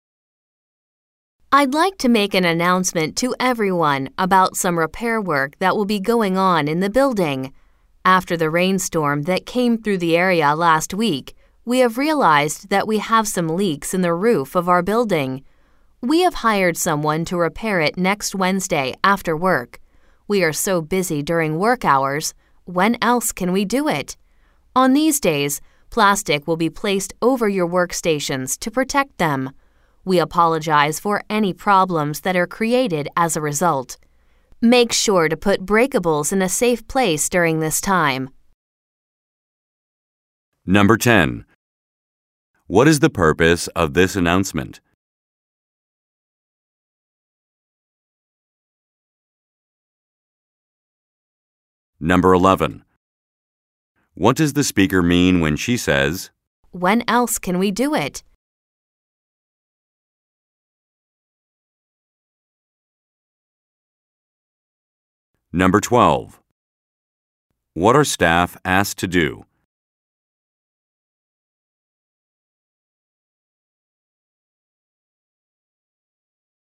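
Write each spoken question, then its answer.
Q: What is the purpose of this announcement?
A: To tell staff about repairs to the leaking roof

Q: What are staff asked to do?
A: Put breakables in a safe place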